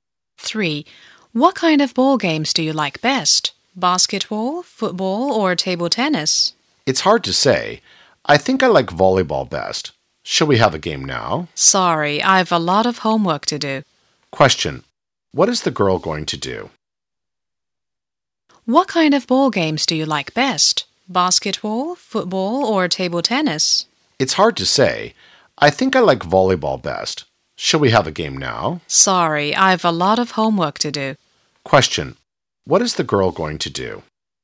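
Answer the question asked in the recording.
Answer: Do her homework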